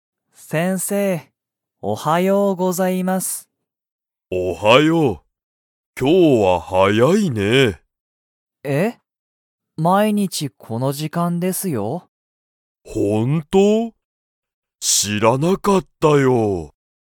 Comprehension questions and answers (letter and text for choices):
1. ナオキは、毎日まいにち早はやいですか?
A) はい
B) いいえ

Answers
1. A) はい

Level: Level 1